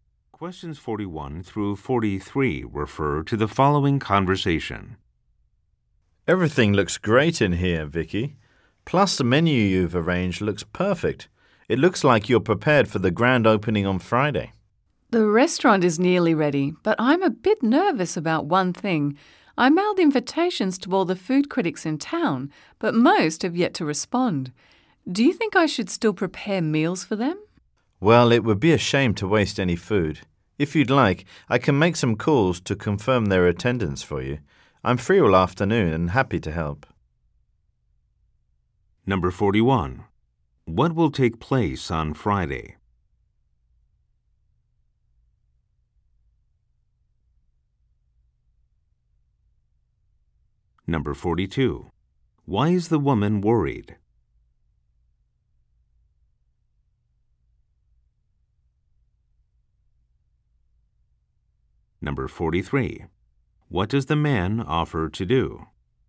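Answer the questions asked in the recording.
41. A restaurant's grand opening
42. Most food critics have not replied to her invitations
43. Call the critics to confirm whether they will come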